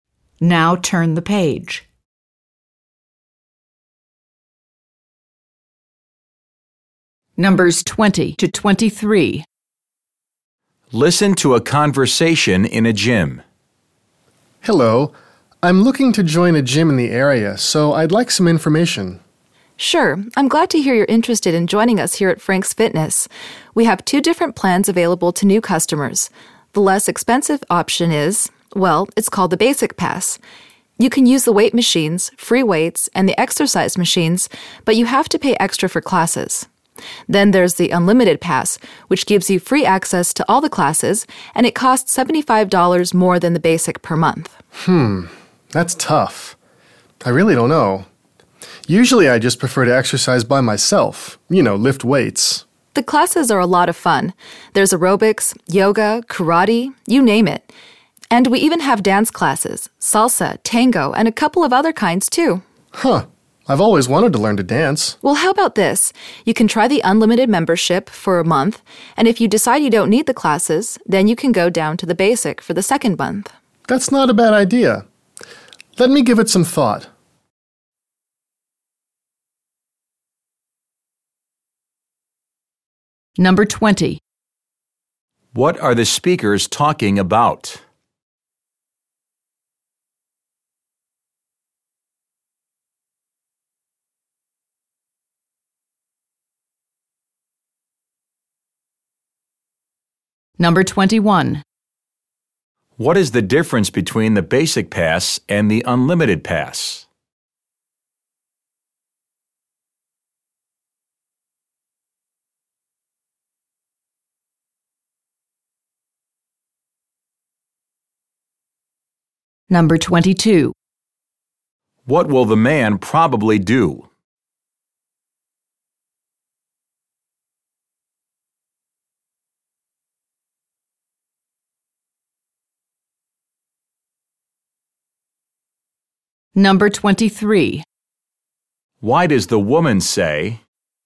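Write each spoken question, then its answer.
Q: What are the speakers talking about?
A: Gym membership plans

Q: What is the difference between the Basic Pass and the Unlimited Pass?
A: The Unlimited Pass includes free classes and costs $75 more per month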